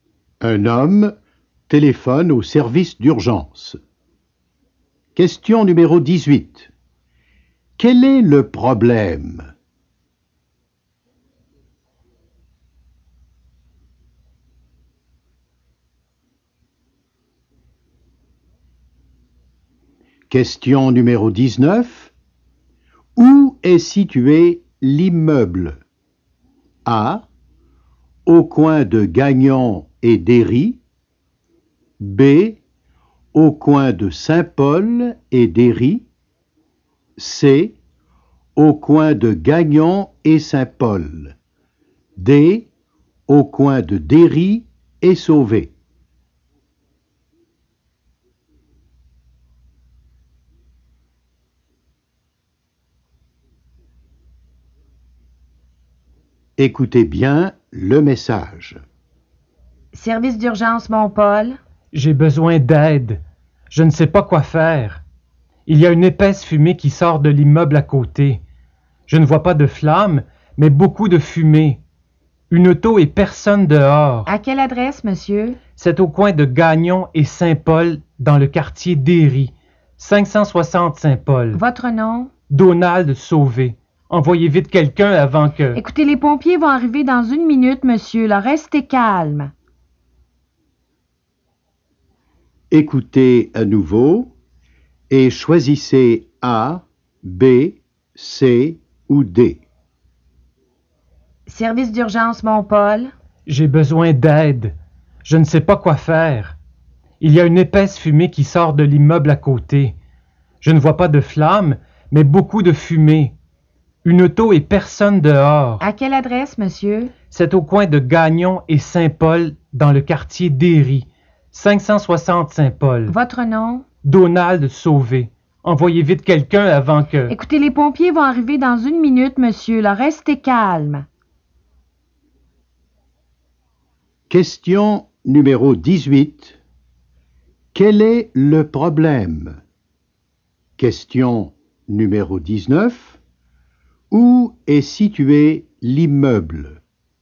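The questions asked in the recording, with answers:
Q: Où est situé l'immeuble ?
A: C: Au coin de Gagnon et Saint-Paul.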